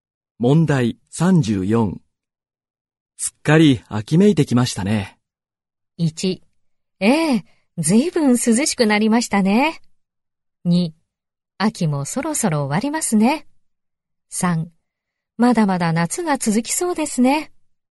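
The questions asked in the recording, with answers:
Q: すっかり秋めいてきましたね。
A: 1: ええ、ずいぶん涼しくなりましたね。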